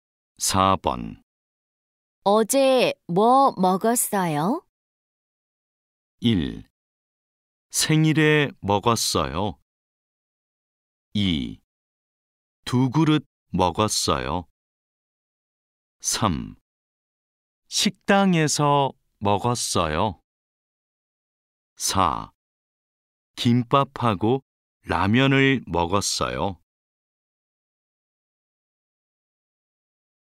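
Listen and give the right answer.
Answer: 4: 김밥하고 라면을 먹었어요.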